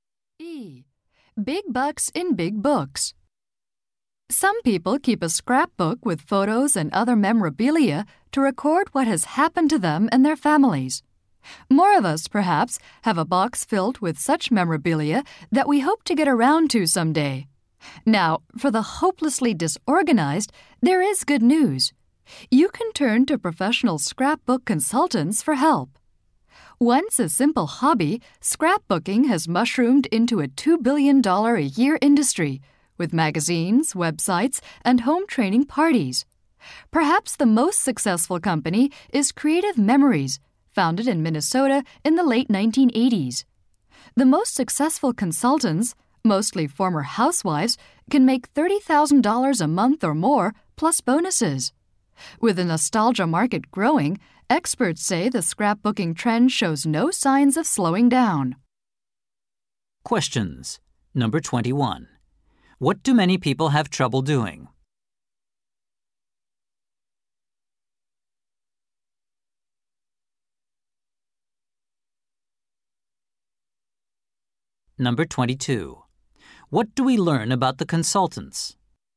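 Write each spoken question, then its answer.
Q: What do many people have trouble doing?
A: Getting around to organizing their memorabilia into scrapbooks

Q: What do we learn about the consultants?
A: The most successful ones, mostly former housewives, can earn $30,000 a month or more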